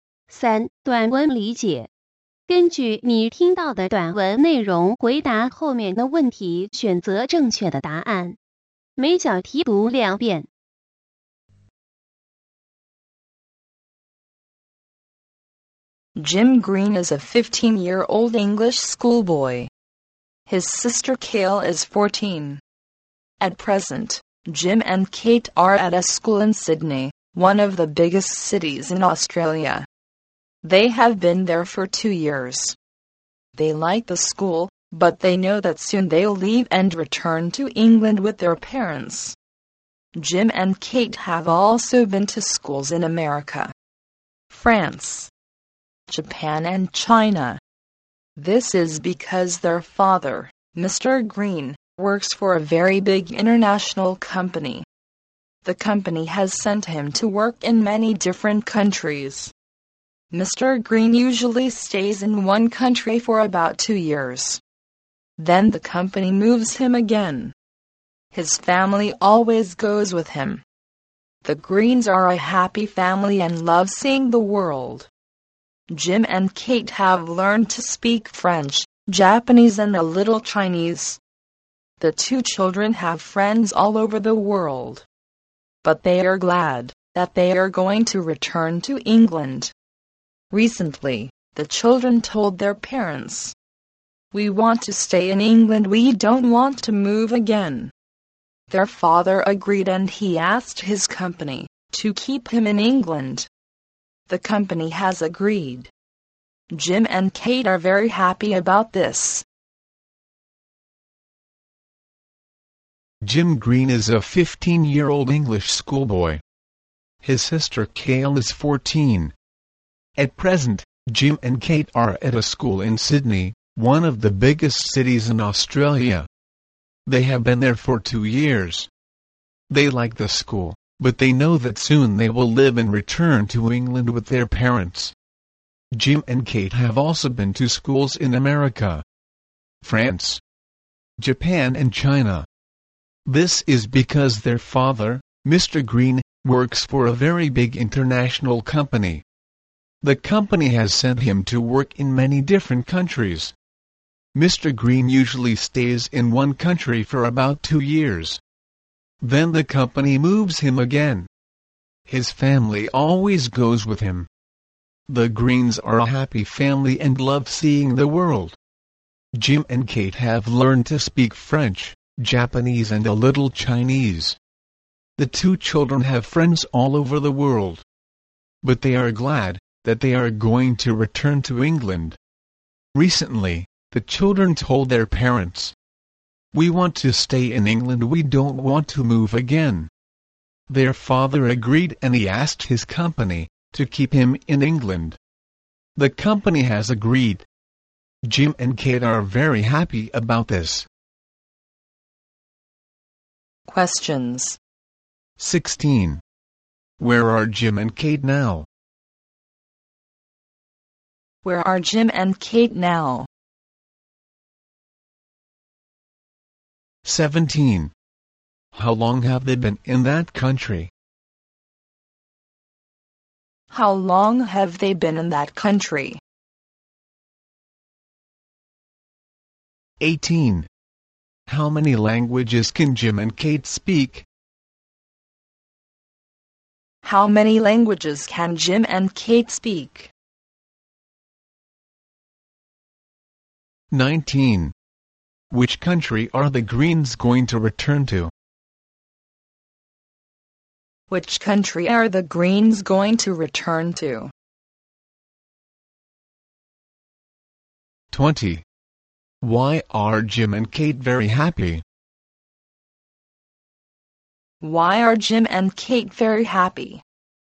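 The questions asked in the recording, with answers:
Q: 16. Where are Jim and Kate now?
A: In Sydney, Australia

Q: 17. How long have they been in that country?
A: For 2 years

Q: 19. Which country are the Greens going to return to?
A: England

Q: 20. Why are Jim and Kate very happy?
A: Because they can stay in England and won't move again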